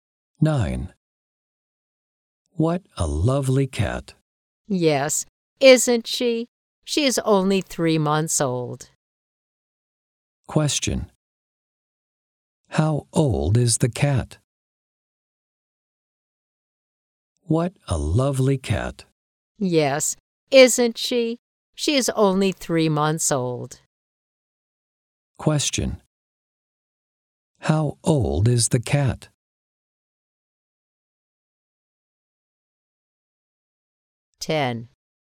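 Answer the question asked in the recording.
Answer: 3 months old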